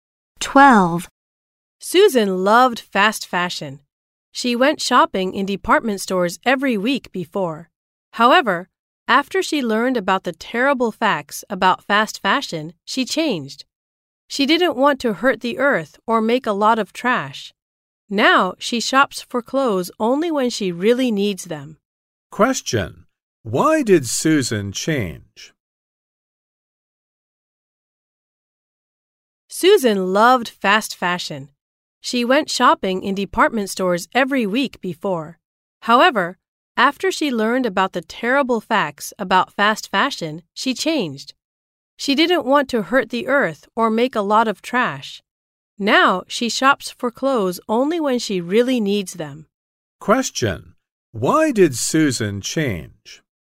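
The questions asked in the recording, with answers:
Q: Why did Susan change?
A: She didn't want to hurt the earth or make a lot of trash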